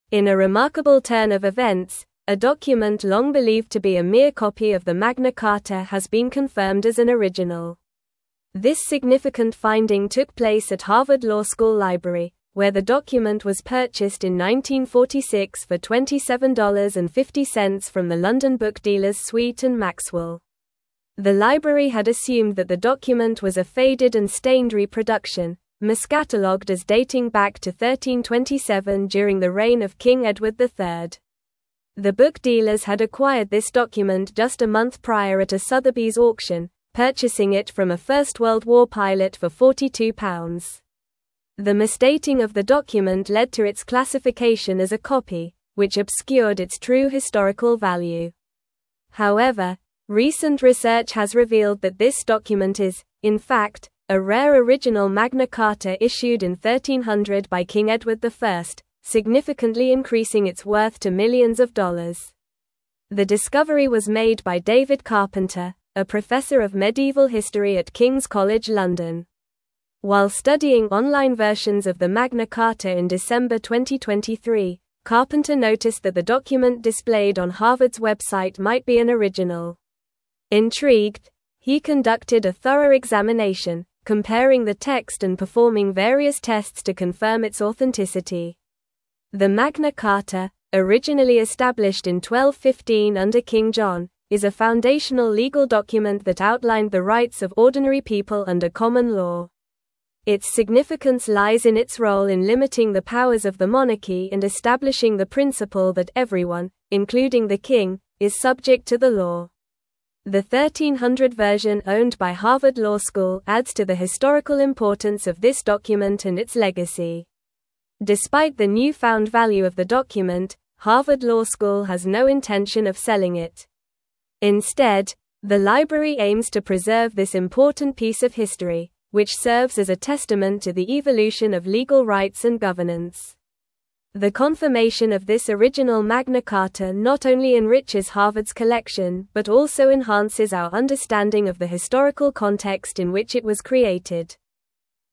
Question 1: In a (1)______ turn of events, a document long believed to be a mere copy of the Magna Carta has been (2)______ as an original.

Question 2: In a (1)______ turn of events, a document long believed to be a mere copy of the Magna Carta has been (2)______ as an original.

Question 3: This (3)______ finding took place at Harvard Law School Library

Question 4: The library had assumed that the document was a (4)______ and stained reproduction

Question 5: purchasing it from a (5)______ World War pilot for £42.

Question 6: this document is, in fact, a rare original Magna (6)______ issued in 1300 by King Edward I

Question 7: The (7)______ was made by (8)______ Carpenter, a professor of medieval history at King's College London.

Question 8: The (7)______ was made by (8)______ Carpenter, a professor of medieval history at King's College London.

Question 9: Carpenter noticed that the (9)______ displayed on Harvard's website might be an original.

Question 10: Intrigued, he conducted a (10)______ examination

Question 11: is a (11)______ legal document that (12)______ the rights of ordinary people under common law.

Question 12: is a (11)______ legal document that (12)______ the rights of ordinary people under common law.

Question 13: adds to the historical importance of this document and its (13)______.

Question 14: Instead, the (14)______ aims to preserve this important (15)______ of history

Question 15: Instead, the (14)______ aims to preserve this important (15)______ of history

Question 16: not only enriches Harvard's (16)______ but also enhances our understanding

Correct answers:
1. remarkable
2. confirmed
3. significant
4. faded
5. First
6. Carta
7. discovery
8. David
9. document
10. thorough
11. foundational
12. outlined
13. legacy
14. library
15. piece
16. collection

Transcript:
In a remarkable turn of events, a document long believed to be a mere copy of the Magna Carta has been confirmed as an original. This significant finding took place at Harvard Law School Library, where the document was purchased in 1946 for $27.50 from the London book dealers Sweet & Maxwell. The library had assumed that the document was a faded and stained reproduction, miscatalogued as dating back to 1327 during the reign of King Edward III.
The book dealers had acquired this document just a month prior at a Sotheby's auction, purchasing it from a First World War pilot for £42. The misdating of the document led to its classification as a copy, which obscured its true historical value. However, recent research has revealed that this document is, in fact, a rare original Magna Carta issued in 1300 by King Edward I, significantly increasing its worth to millions of dollars.
The discovery was made by David Carpenter, a professor of medieval history at King's College London. While studying online versions of the Magna Carta in December 2023, Carpenter noticed that the document displayed on Harvard's website might be an original. Intrigued, he conducted a thorough examination, comparing the text and performing various tests to confirm its authenticity.
The Magna Carta, originally established in 1215 under King John, is a foundational legal document that outlined the rights of ordinary people under common law. Its significance lies in its role in limiting the powers of the monarchy and establishing the principle that everyone, including the king, is subject to the law. The 1300 version owned by Harvard Law School adds to the historical importance of this document and its legacy.
Despite the newfound value of the document, Harvard Law School has no intention of selling it. Instead, the library aims to preserve this important piece of history, which serves as a testament to the evolution of legal rights and governance. The confirmation of this original Magna Carta not only enriches Harvard's collection but also enhances our understanding of the historical context in which it was created.

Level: Level 4